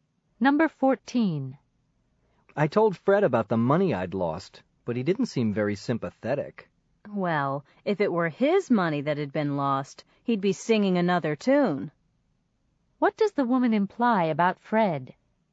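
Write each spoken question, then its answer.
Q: What does the woman imply about Fred?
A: He'd feel differently if it were his own money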